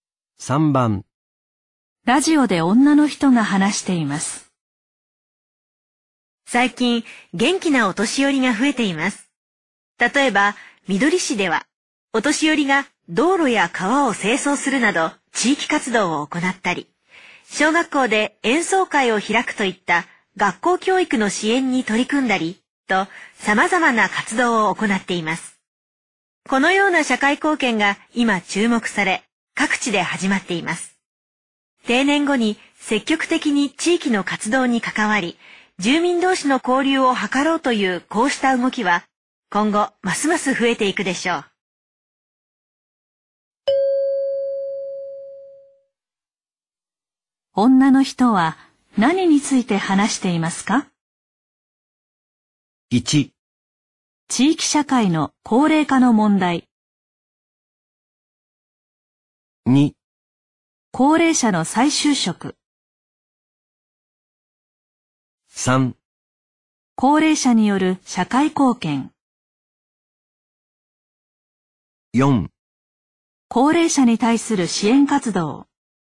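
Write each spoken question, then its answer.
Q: 女の人は何について話していますか?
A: 3: 高齢者による社会貢献。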